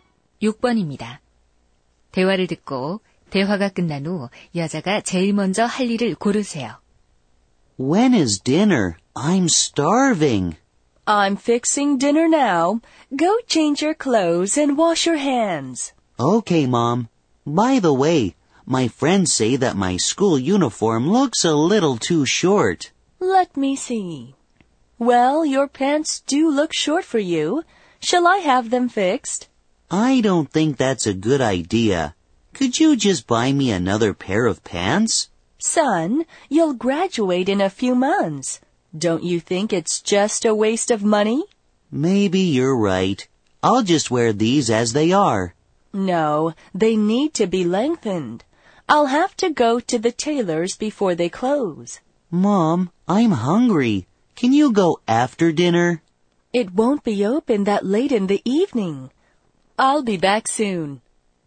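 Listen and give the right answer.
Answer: 수선집에 가서 바지 길이를 늘이기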